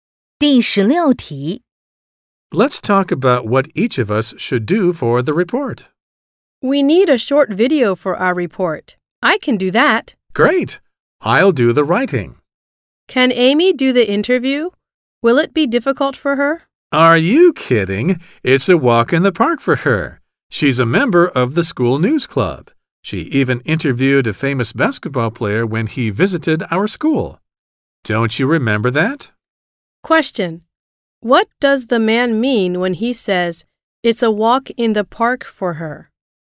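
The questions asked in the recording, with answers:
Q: What does the man mean when he says, it's a walk in the park for her?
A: It will be easy for Amy to do the interview.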